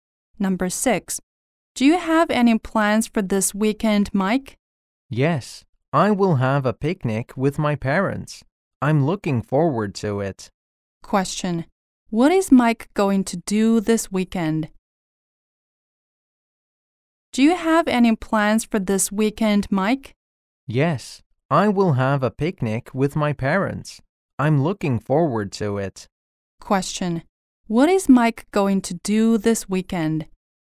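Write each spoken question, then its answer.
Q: Question, what is Mike going to do this weekend?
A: Have a picnic with his parents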